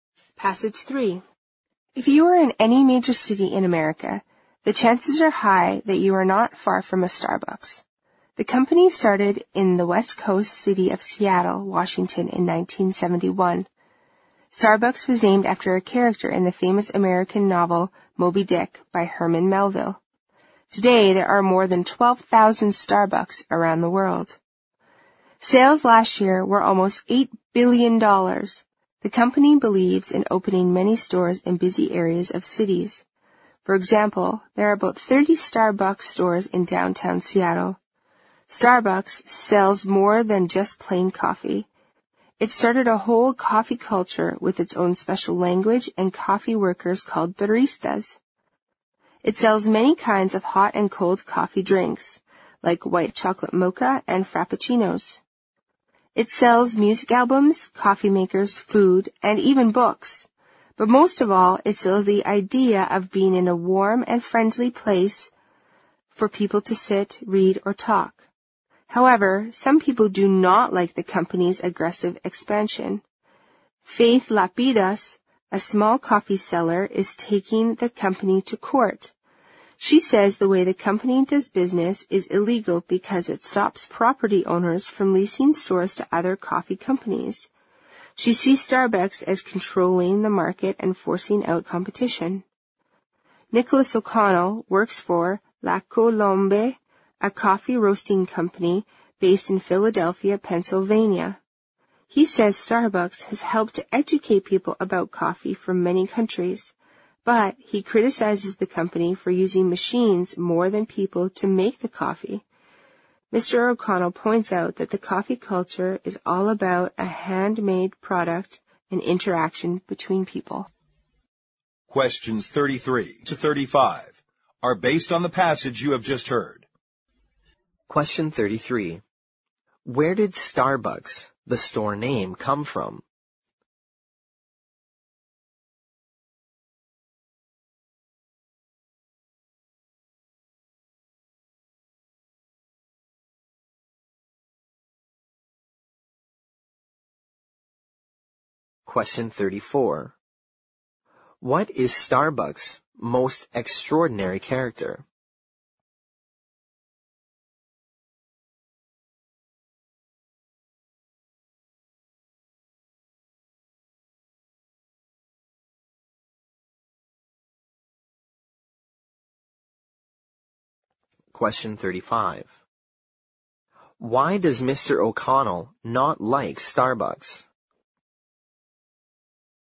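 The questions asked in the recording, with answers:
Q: Where did Starbucks, the store name, come from?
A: From a character in the novel Moby Dick by Herman Melville

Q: Why does Mr. O'Connell not like Starbucks?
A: It uses machines more than people to make the coffee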